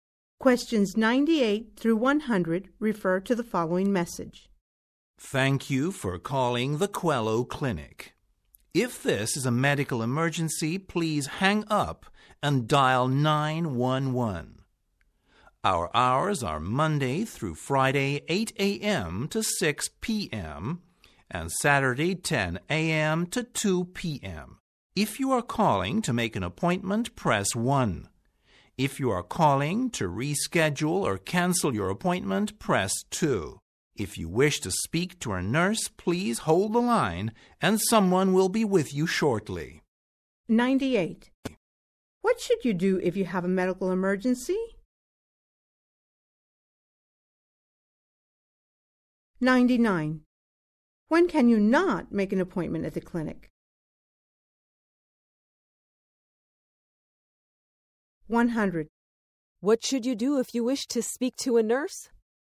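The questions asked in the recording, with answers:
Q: What should you do if you have a medical emergency?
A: Hang up and dial 911

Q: What should you do if you wish to speak to a nurse?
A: Hold the line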